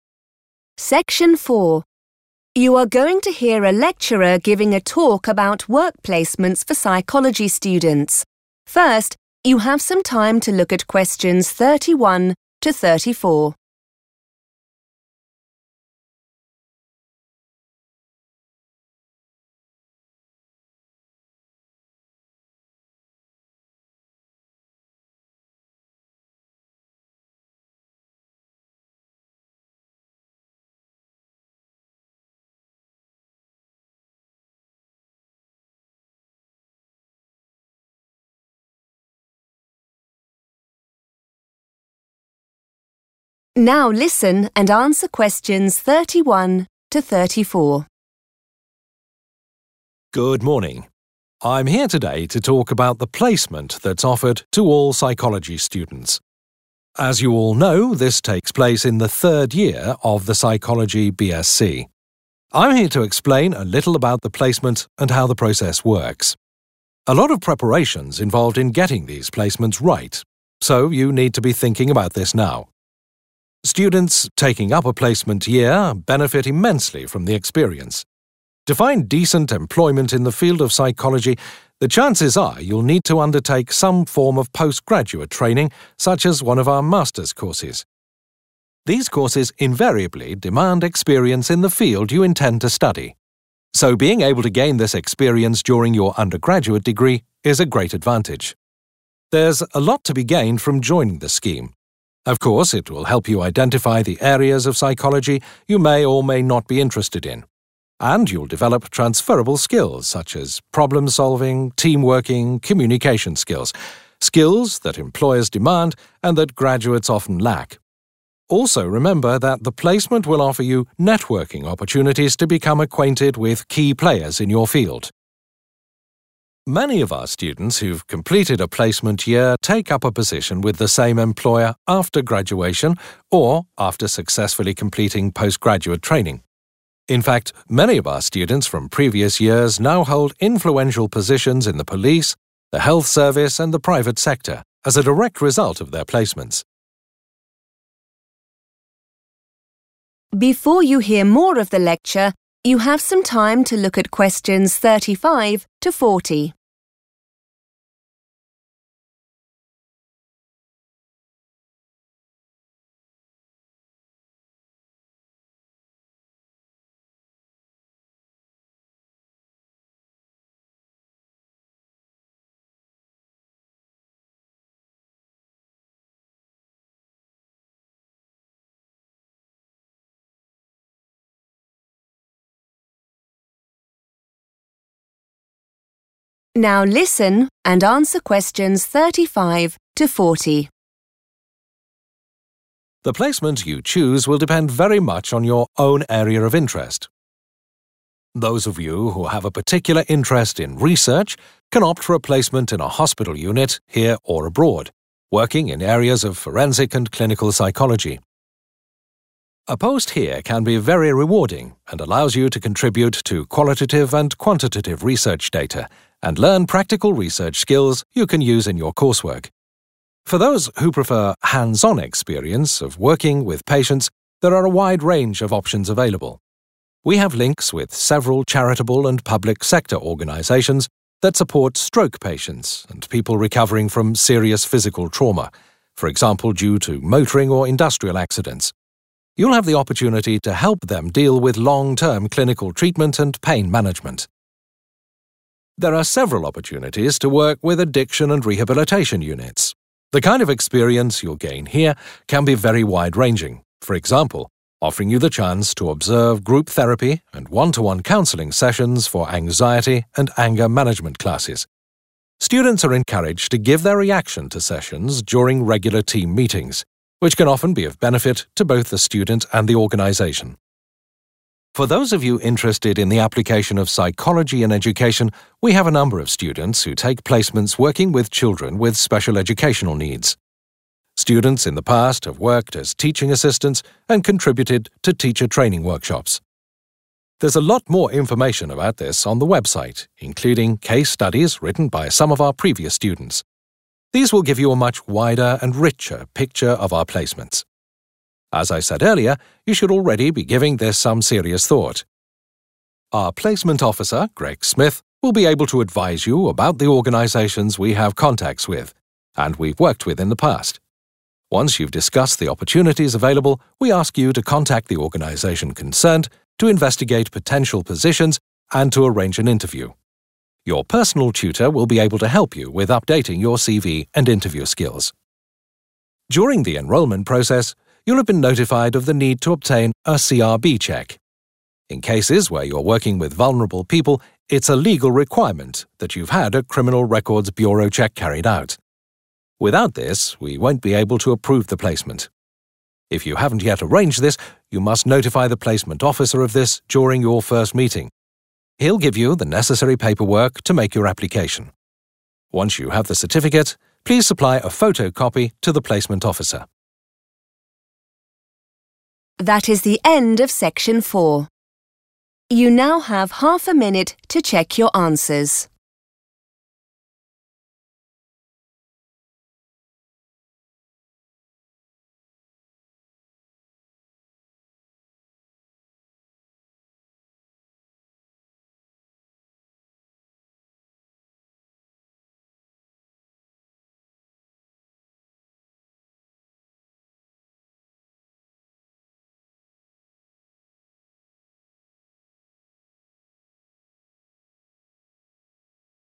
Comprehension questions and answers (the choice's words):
Choose the correct letter, A, B or C.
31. Work experience is required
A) to get a professional job.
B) to do a postgraduate degree.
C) to join an undergraduate course.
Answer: to do a postgraduate degree.

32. Graduates on placements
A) develop skills employers require.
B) are transferred to various posts.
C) should avoid making too many demands on employers.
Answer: develop skills employers require.

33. Placements can offer the opportunity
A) to make an impact on the working environment.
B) to get to know important people in the area of work.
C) to meet new and interesting people.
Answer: to get to know important people in the area of work.

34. Placements can lead to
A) future employment with the same organisation.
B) a better class of postgraduate degree.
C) greater influence with large organisations.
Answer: future employment with the same organisation.

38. It is the responsibility of the student _____ an interview.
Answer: to arrange

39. It is _____ to have a CRB check when working with certain clients.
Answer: a legal requirement

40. Forms for the CRB check can be obtained from _____ .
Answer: the placement officer / Greg Smith

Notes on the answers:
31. The correct answer is B because the speaker explains that getting a good job in psychology usually requires more school after people finish their first degree. This extra school, called postgraduate training or Master's courses, always asks for or requires previous experience in that specific area of study. Therefore, students need that work experience to enter those higher-level courses. Keywords like 'postgraduate training', 'demand', and 'experience' show that this work is a requirement for further study.
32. The correct answer is A because the text lists several skills that students will learn during their placement, such as solving problems and working well with others. The speaker explains that these are skills that companies need, even though many new university finishers do not have them yet. By using the word 'demand,' the speaker emphasizes that these abilities are necessary to get a job.
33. The correct answer is B because the text explains that these job placements give students networking opportunities. Networking is the process of meeting people who might be able to help you in your future career. In the transcript, the speaker specifically mentions becoming acquainted with key players, where key players means important or influential people in that specific field of work.
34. The correct answer is A because the speaker explains that many students get a job with the same person or company they worked for during their placement. In the text, 'take up a position' means to start a job, and 'same employer' means the same organization or boss.
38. The correct answer is supported by the speaker's instructions on how to get a placement. The speaker explains that after talking about choices, the school asks the student to contact the employer themselves to find a job and set up an interview. This shows that the student is responsible for making the appointment. Key words to notice are "ask you to... arrange an interview."
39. The correct answer is found in the section of the talk where the speaker discusses the Criminal Records Bureau (CRB) check. The speaker says it is a 'legal requirement' for students working with 'vulnerable people' (who are the 'certain clients' mentioned in the question). This means it is a rule that must be followed according to the law.
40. The correct answer is 'the placement officer' or 'Greg Smith' because the speaker notes that if students do not have a background check yet, they must tell the officer. This person will then provide the required documents (paperwork) for the application. Earlier in the talk, Greg Smith is introduced as the person who helps with placements.

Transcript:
Good morning. I'm here today to talk about the placement that's offered to all Psychology students. As you all know this takes place in the third year of the Psychology BSc. I'm here to explain a little about the placement and how the process works. A lot of preparation's involved in getting these placements right so you need to be thinking about this now.
Students taking up a placement year benefit immensely from the experience. To find decent employment in the field of psychology the chances are you'll need to undertake some form of postgraduate training such as one of our Master's courses. These courses invariably demand experience in the field you intend to study so being able to gain this experience during your undergraduate degree is a great advantage.
There's a lot to be gained from joining the scheme. Of course it will help you identify the areas of psychology you may or may not be interested in. And you'll develop transferable skills such as problem solving, team working, communication skills – skills that employers demand and that graduates often lack. Also remember that the placement will offer you networking opportunities to become acquainted with key players in your field.
Many of our students who've completed a placement year take up a position with the same employer after graduation or after successfully completing postgraduate training. In fact many of our students from previous years now hold influential positions in the police, the health service and the private sector as a direct result of their placements.
The placement you choose will depend very much on your own area of interest. Those of you who have a particular interest in research can opt for a placement in a hospital unit here or abroad, working in areas of forensic and clinical psychology. A post here can be very rewarding and allows you to contribute to qualitative and quantitative research data and learn practical research skills you can use in your coursework.
For those who prefer hands-on experience of working with patients there are a wide range of options available. We have links with several charitable and public-sector organisations that support stroke patients and people recovering from serious physical trauma, for example due to motoring or industrial accidents. You will have the opportunity to help them deal with long-term clinical treatment and pain management.
There are several opportunities to work with addiction and rehabilitation units. The kind of experience you'll gain here can be very wide-ranging, for example offering you the chance to observe group therapy and one-to-one counselling sessions for anxiety and anger management classes. Students are encouraged to give their reaction to sessions during regular team meetings, which can often be of benefit to both the student and the organisation.
For those of you interested in the application of psychology in education, we have a number of students who take placements working with children with special educational needs. Students in the past have worked as teaching assistants and contributed to teacher-training workshops.
There's a lot more information about this on the website including case studies written by some of our previous students. These will give you a much wider and richer picture of our placements.
As I said earlier, you should already be giving this some serious thought. Our placement tutor, Greg Smith, will be able to advise you about the organisations we have contacts with and we've worked with in the past. Once you've discussed the opportunities available we ask you to contact the organisation concerned to investigate potential positions and to arrange an interview. Your personal tutor will be able to help you with updating your CV and interview skills.
During the enrolment process you'll have been notified of the need to obtain a CRB check. In cases where you're working with vulnerable people it's a legal requirement that you've had a Criminal Records Bureau check carried out. Without this we won't be able to approve the placement. If you haven't yet arranged this you must notify the placement officer of this during your first meeting. He'll give you the necessary paperwork to make your application. Once you have the certificate, please supply a photocopy to the placement officer.